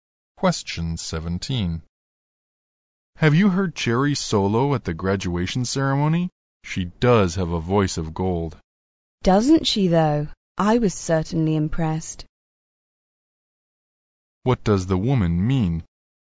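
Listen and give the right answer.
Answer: She agrees that Cherry sings very well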